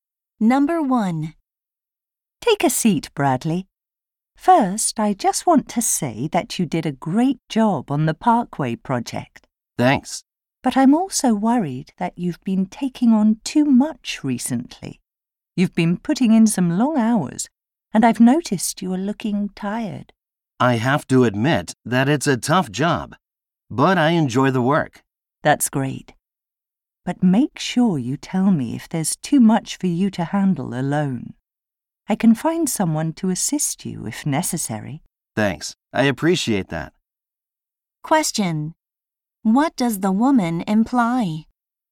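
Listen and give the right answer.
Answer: Bradley may be overworked; she can find someone to help him if needed.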